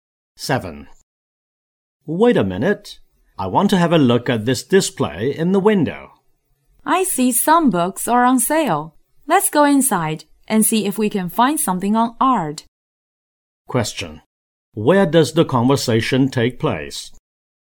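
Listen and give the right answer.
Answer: Outside a bookstore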